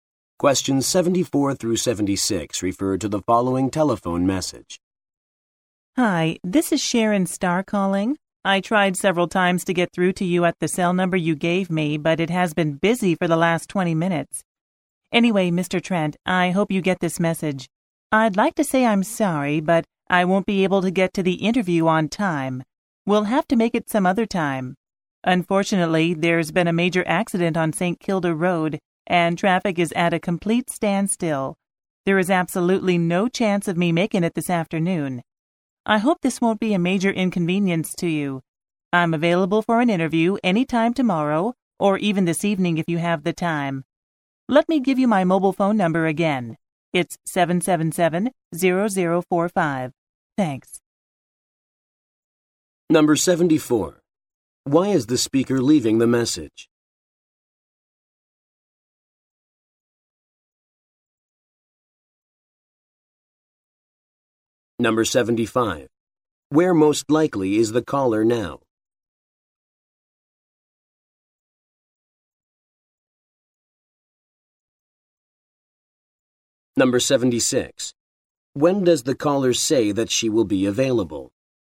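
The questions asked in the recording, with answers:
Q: Why is the speaker leaving the message?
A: She cannot get to the interview on time

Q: Where most likely is the caller now?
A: Stuck in traffic on the road

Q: When does the caller say that she will be available?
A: Any time tomorrow or this evening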